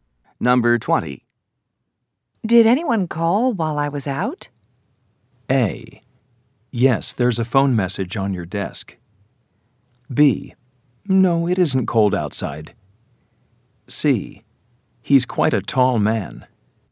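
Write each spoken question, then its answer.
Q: Did anyone call while I was out?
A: A: Yes, there's a phone message on your desk.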